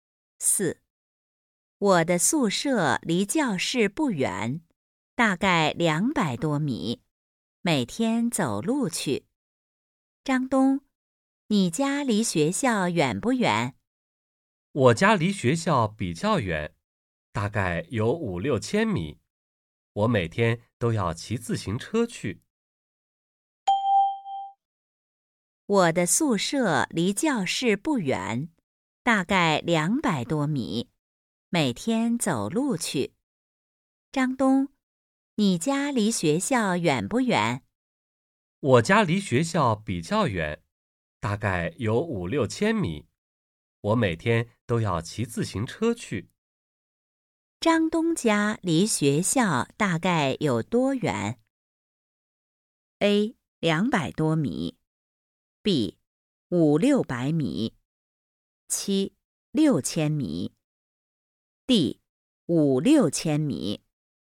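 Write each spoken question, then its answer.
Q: 张东家离学校大概有多远?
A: D: 5-6千米。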